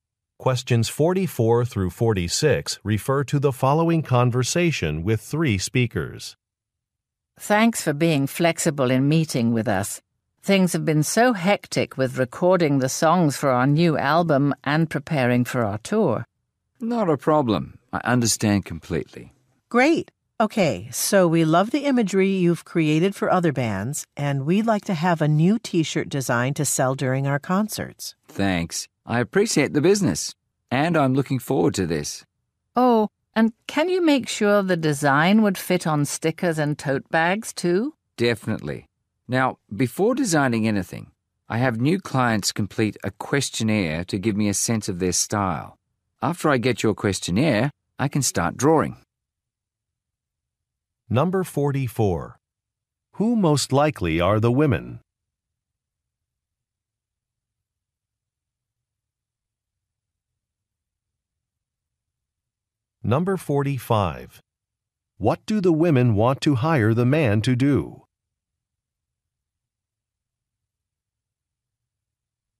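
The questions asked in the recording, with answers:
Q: Who most likely are the women?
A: Musicians in a band

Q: What do the women want to hire the man to do?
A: Design a T-shirt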